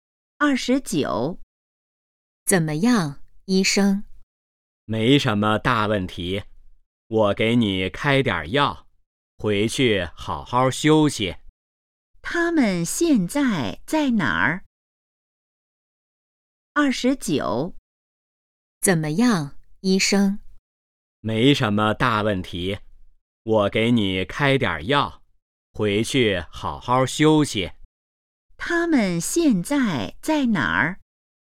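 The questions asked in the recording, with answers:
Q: 他们现在在哪儿?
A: 医院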